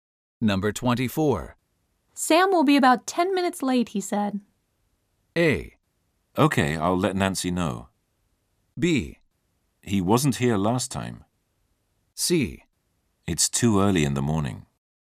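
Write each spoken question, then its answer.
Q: Sam will be about 10 minutes late, he said.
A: A: Okay, I'll let Nancy know.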